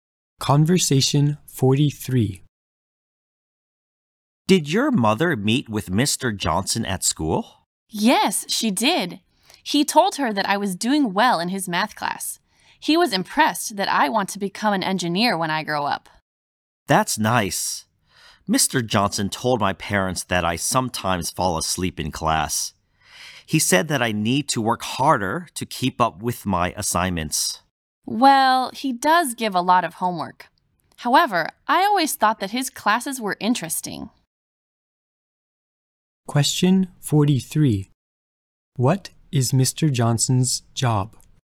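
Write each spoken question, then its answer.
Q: What is Mr. Johnson's job?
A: A math teacher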